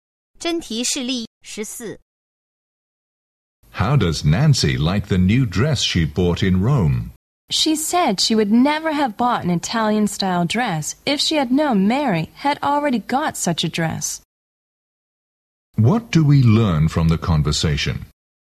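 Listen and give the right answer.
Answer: Nancy regrets buying the dress because Mary already has one like it.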